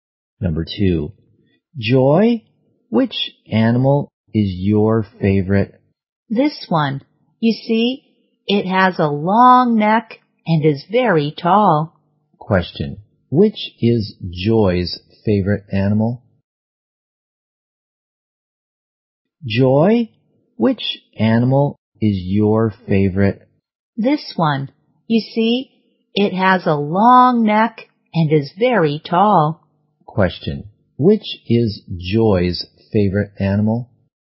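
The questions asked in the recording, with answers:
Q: which is Joy's favorite animal?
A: The giraffe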